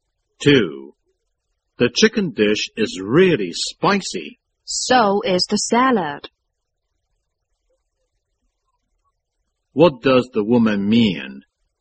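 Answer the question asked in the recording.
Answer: The salad is spicy too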